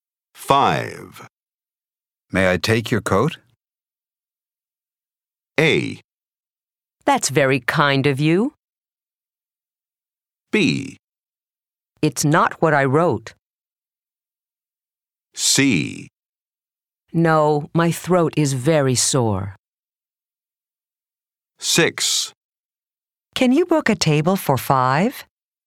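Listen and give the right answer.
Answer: A: That's very kind of you.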